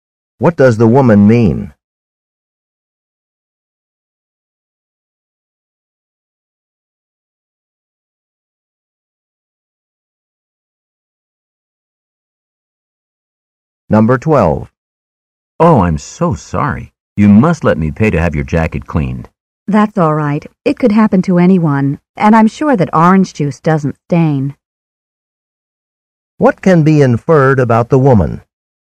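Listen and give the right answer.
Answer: She doesn't want the man to pay to clean her jacket.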